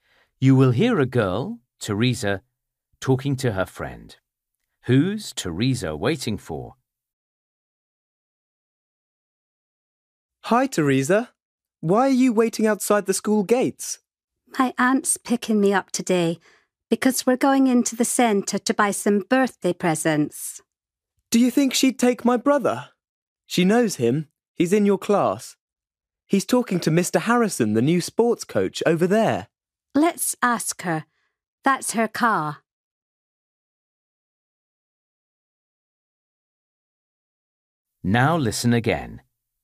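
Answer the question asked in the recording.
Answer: Her aunt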